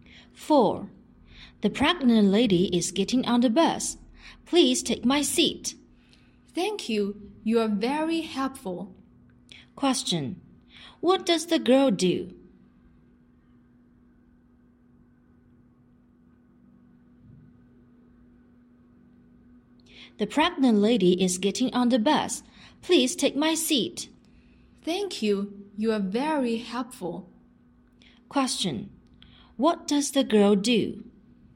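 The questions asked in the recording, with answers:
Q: What does the girl do?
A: She gives her seat to the pregnant lady.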